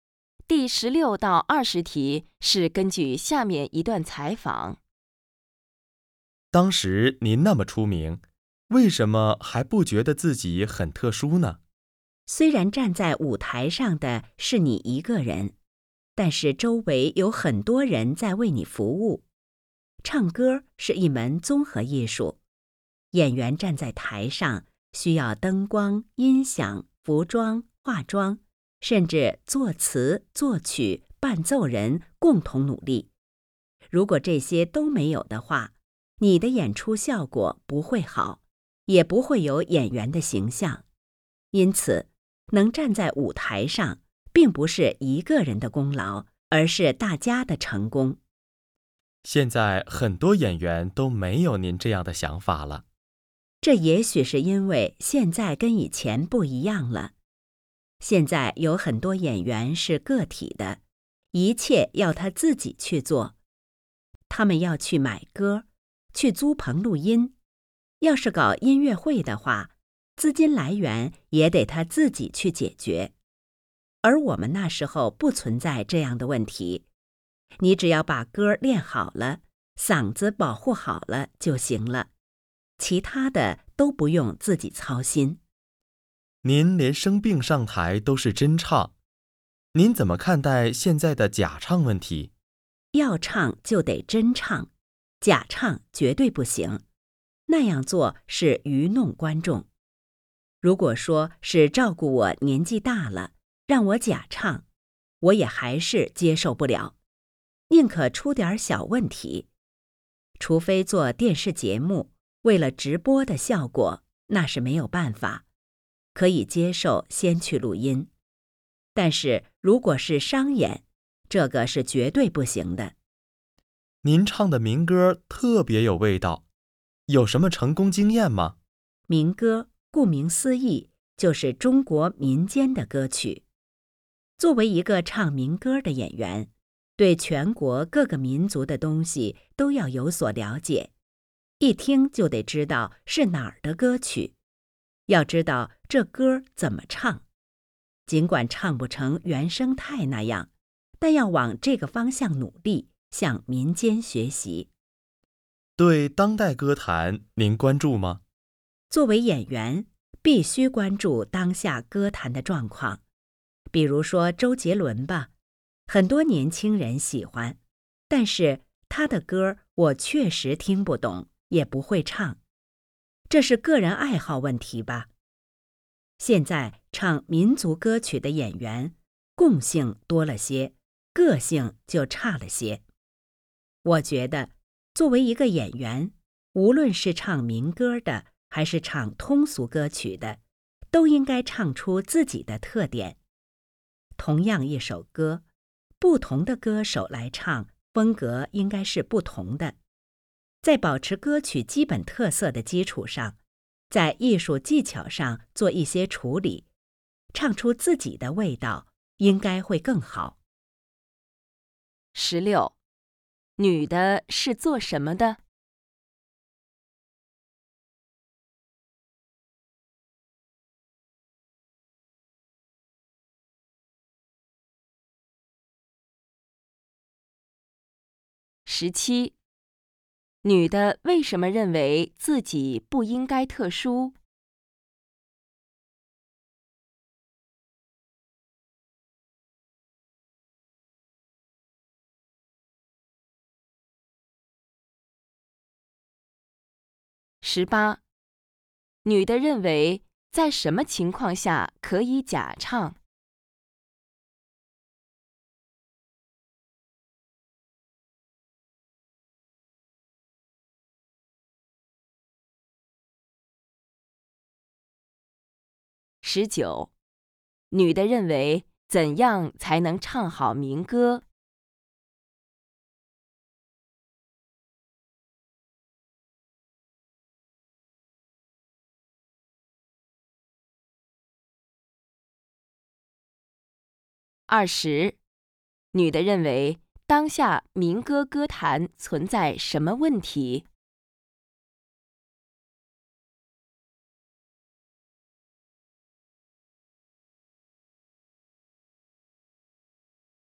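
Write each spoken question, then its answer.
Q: 女的是做什么的?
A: 歌唱家(唱民歌的演员)

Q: 女的为什么认为自己不应该特殊?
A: 演出成功是大家共同努力的结果

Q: 女的认为在什么情况下可以假唱?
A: 做电视节目直播时

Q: 女的认为怎样才能唱好民歌?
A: 了解各民族的歌曲,向民间学习

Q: 女的认为当下民歌歌坛存在什么问题?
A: 共性多,个性差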